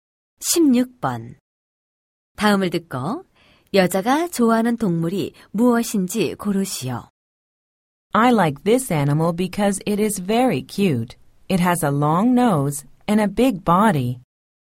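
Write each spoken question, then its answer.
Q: 다음을 듣고 여자가 좋아하는 동물이 무엇인지 고르시오.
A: 코끼리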